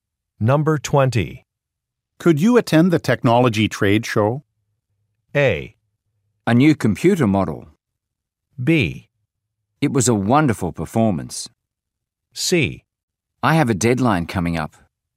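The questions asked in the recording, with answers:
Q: Could you attend the technology trade show?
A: C: I have a deadline coming up.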